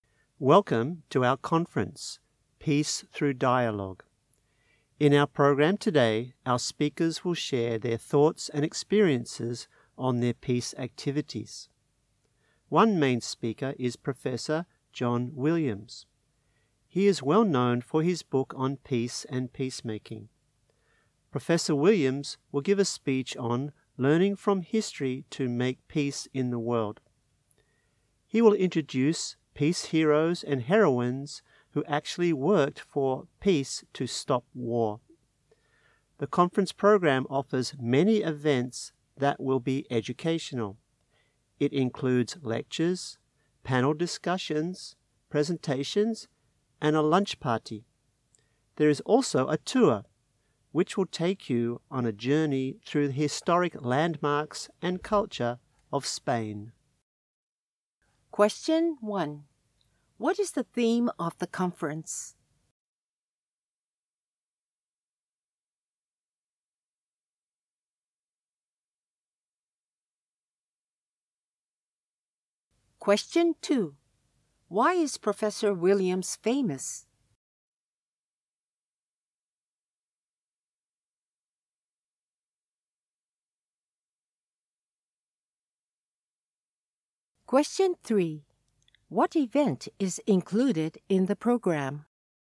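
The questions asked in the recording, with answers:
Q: What is the theme of the conference?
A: Peace Through Dialogue

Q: Why is Professor Williams famous?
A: For his book on peace and peacemaking

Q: What event is included in the program?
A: Lectures, panel discussions, presentations, a lunch party, and a tour of Spain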